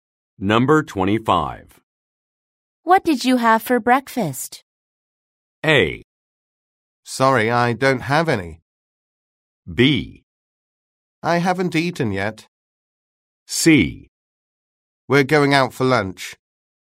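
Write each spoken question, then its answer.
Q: What did you have for breakfast?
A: B: I haven't eaten yet.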